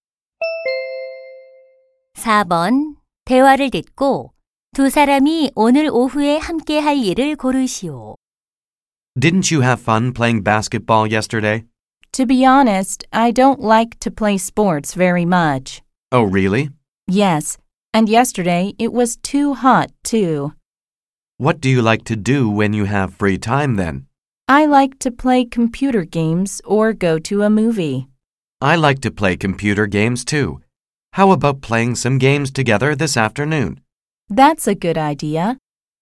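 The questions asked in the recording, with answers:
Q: 대화를 듣고 두 사람이 오늘 오후에 함께 할 일을 고르시오.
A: 컴퓨터 게임하기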